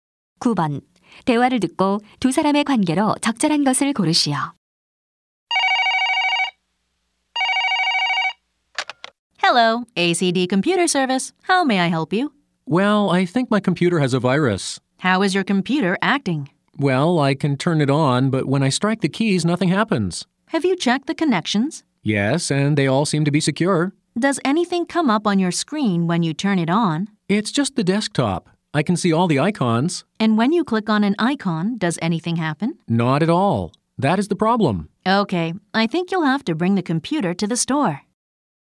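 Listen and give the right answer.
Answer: 고객 - 컴퓨터 수리 기사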